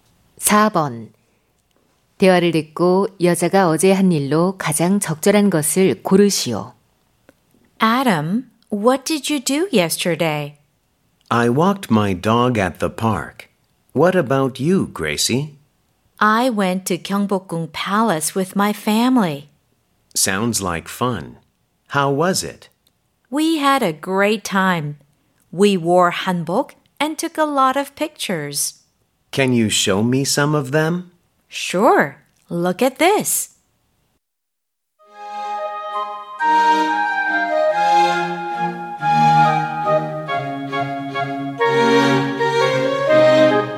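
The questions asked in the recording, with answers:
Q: 대화를 듣고 여자가 어제 한 일로 가장 적절한 것을 고르시오.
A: 가족과 경복궁에 가서 한복을 입고 사진 찍기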